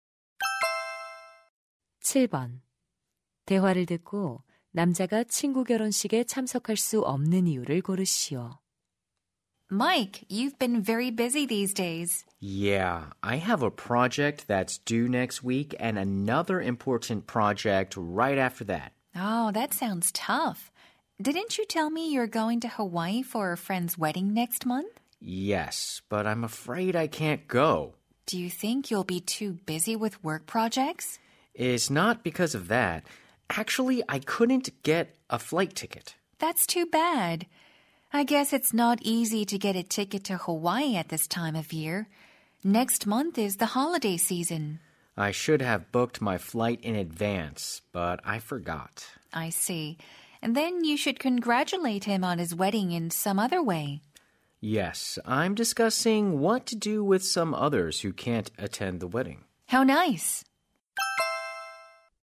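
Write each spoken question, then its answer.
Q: 대화를 듣고 남자가 친구 결혼식에 참석할 수 없는 이유를 고르시오.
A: 항공권을 구하지 못해서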